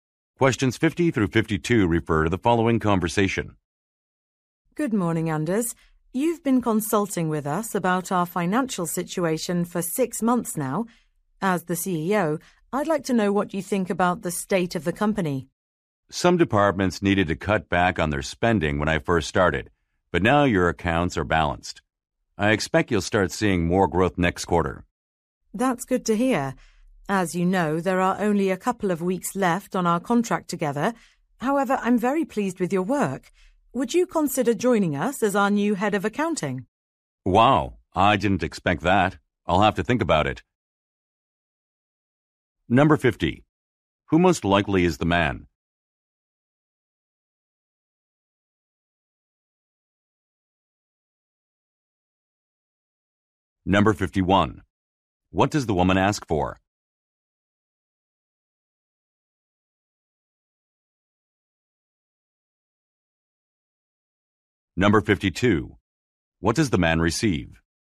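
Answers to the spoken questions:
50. A financial consultant
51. His opinion on the state of the company
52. A job offer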